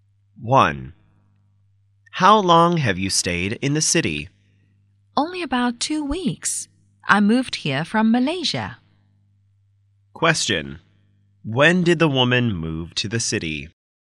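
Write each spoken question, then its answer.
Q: When did the woman move to the city?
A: About two weeks ago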